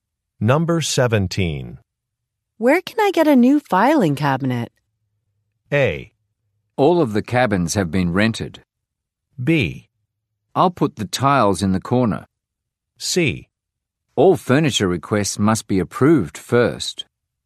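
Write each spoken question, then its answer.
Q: Where can I get a new filing cabinet?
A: C: All furniture requests must be approved first.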